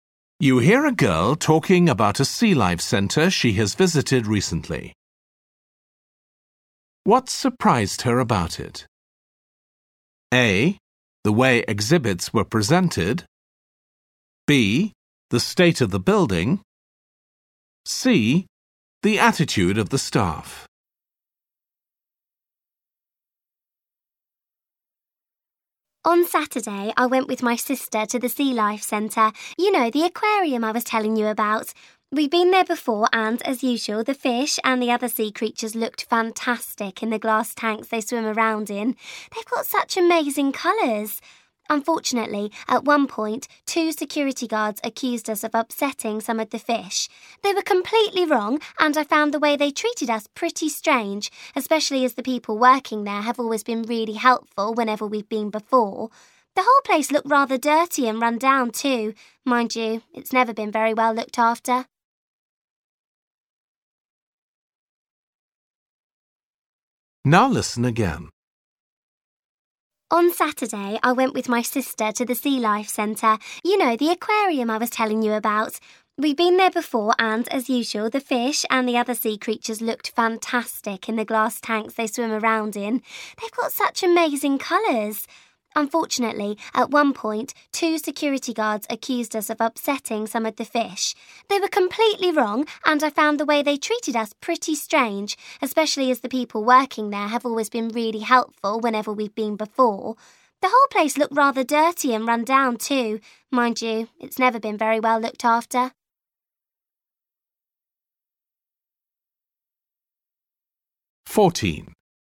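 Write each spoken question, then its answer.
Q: What surprised her about it?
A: C: The attitude of the staff.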